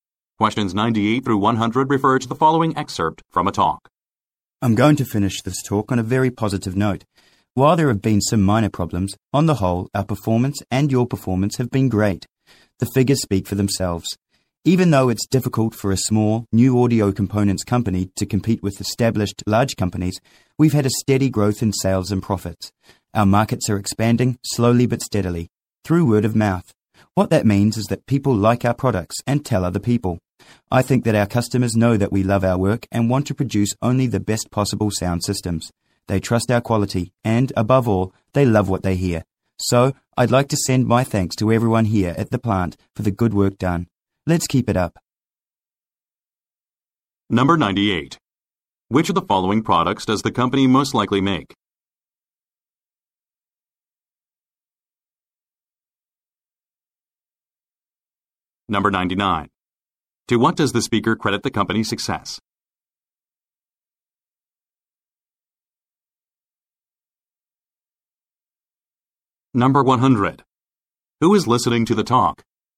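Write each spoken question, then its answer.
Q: Which of the following products does the company most likely make?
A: Sound systems

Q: Who is listening to the talk?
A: Plant employees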